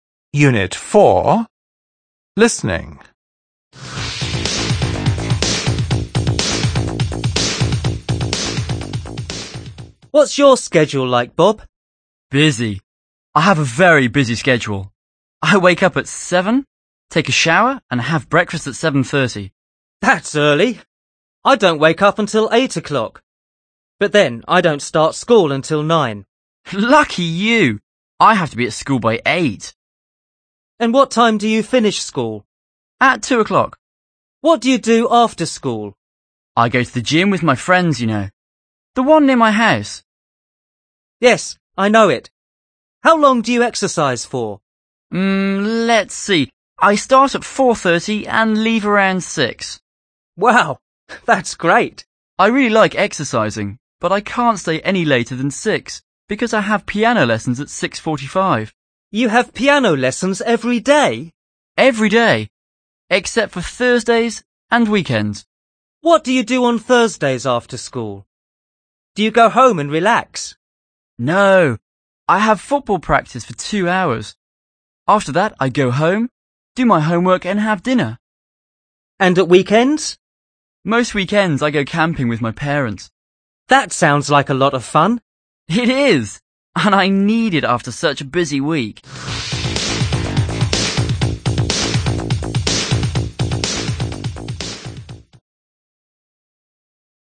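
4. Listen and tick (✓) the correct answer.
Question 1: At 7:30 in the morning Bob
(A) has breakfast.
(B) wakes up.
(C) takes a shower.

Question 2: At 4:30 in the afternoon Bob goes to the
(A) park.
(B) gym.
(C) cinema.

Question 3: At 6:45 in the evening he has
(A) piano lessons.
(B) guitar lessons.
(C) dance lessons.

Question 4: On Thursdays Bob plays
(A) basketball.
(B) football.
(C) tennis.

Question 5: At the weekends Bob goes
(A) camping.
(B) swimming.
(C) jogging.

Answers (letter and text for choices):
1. (A) has breakfast.
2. (B) gym.
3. (A) piano lessons.
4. (B) football.
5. (A) camping.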